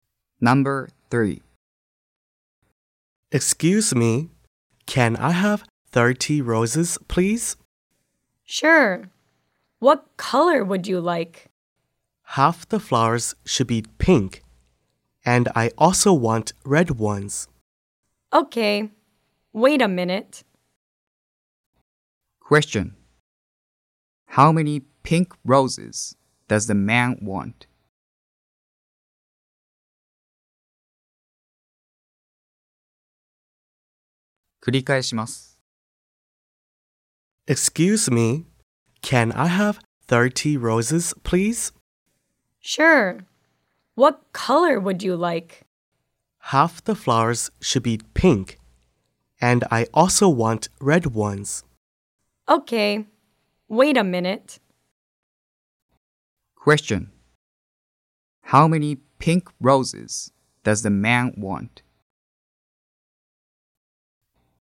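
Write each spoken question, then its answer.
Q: How many pink roses does the man want?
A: 15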